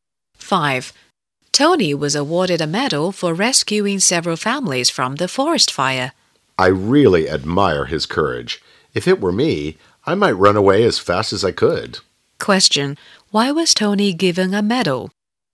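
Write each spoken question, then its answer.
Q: Why was Tony given a medal?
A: He rescued several families from a forest fire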